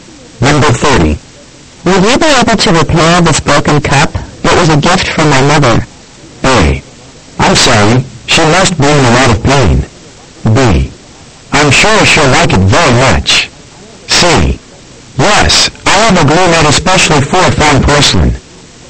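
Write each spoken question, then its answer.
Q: Will you be able to repair this broken cup?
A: C: Yes, I have a glue made especially for fine porcelain.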